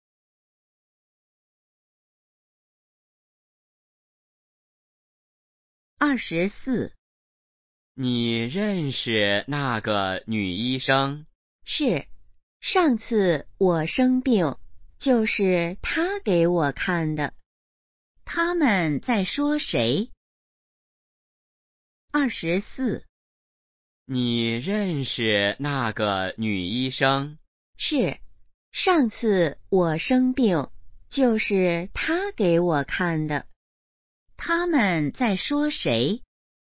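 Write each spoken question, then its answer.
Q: 他们在说谁?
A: 那个女医生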